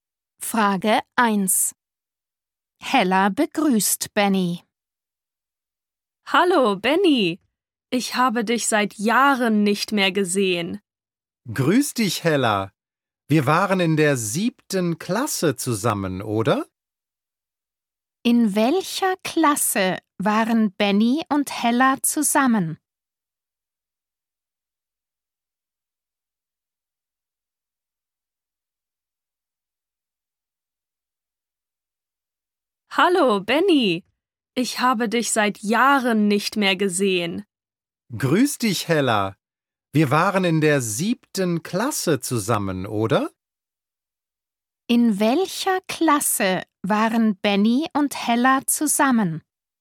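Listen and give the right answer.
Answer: In der 7. Klasse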